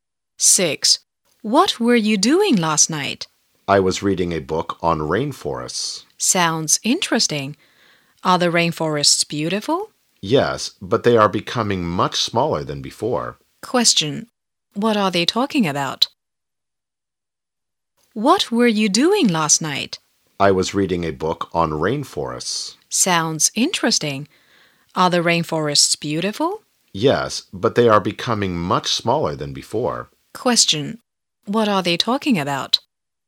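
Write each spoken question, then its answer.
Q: What are they talking about?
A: Rainforests (a book on rainforests)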